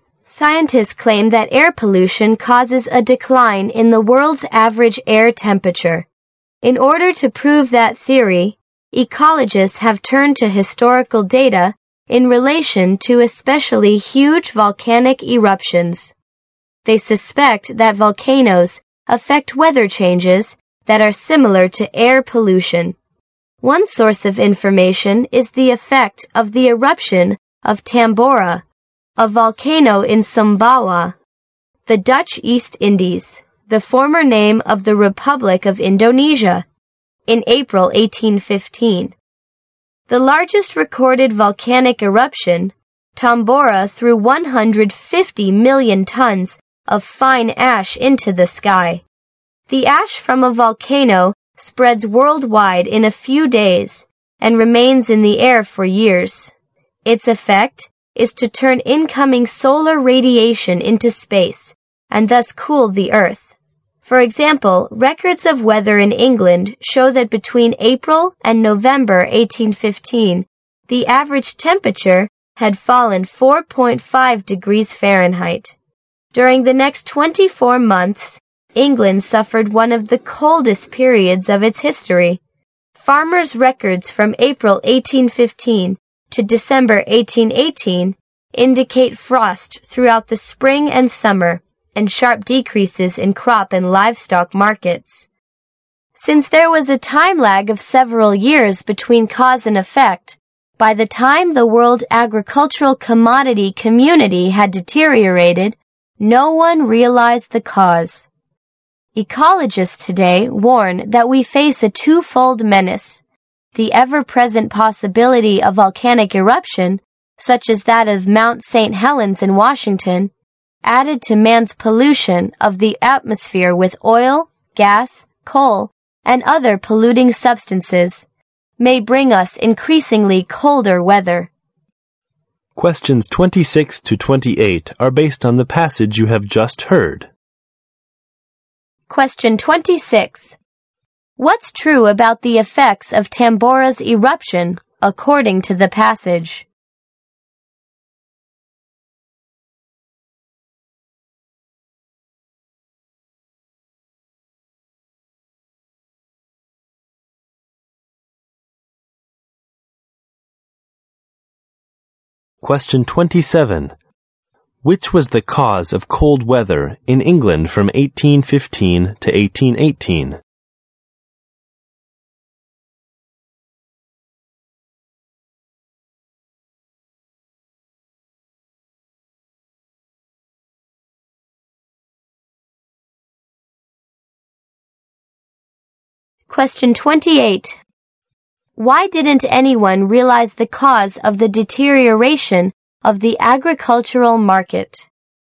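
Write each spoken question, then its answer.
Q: What's true about the effects of Tambora's eruption, according to the passage?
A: Its ash spread worldwide and cooled the Earth

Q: Which was the cause of cold weather in England from 1815 to 1818?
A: The eruption of Tambora

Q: Why didn't anyone realize the cause of the deterioration of the agricultural market?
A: There was a time lag of several years between cause and effect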